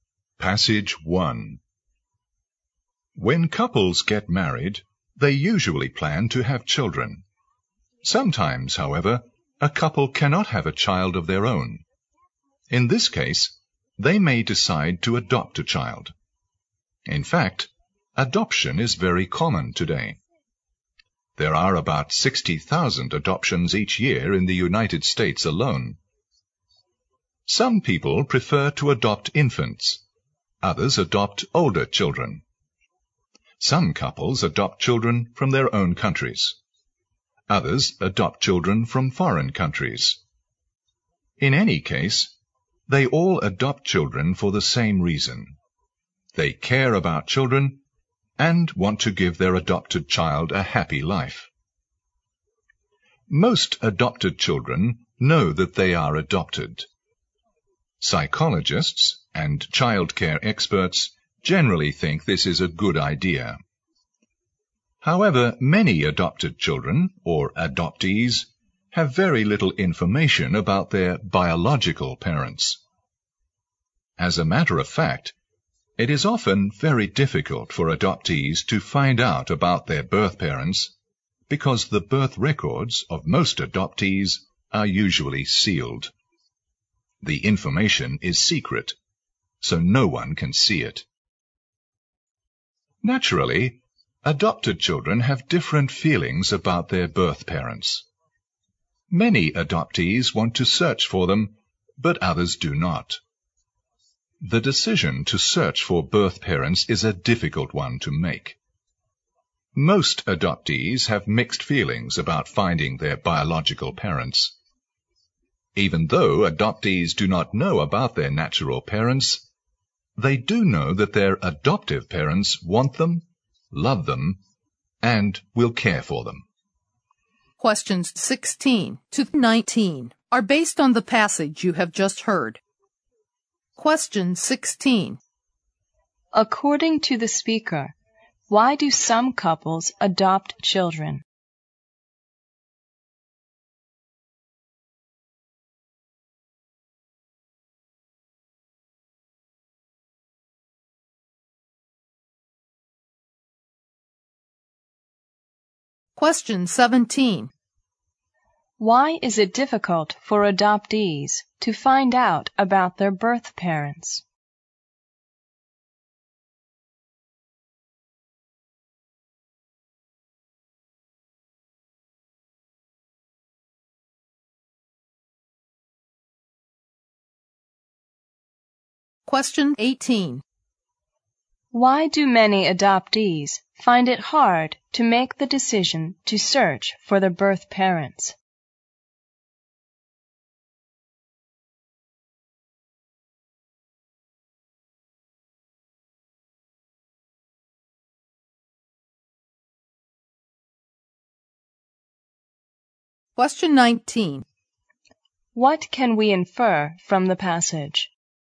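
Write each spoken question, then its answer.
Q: According to the speaker, why do some couples adopt children?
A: They care about children and want to give them a happy life.

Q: Why is it difficult for adoptees to find out about their birth parents?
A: Their birth records are usually sealed.

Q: Why do many adoptees find it hard to make the decision to search for their birth parents?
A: They have mixed feelings about finding them.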